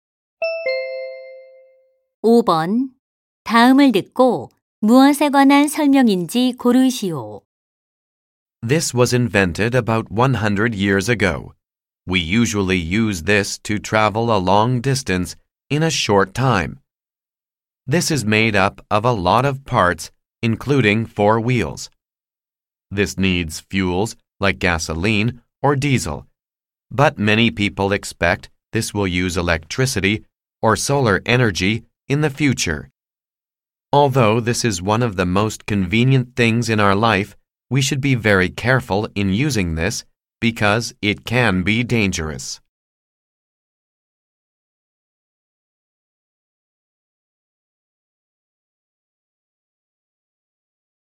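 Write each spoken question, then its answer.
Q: 다음을 듣고 무엇에 관한 설명인지 고르시오.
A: 자동차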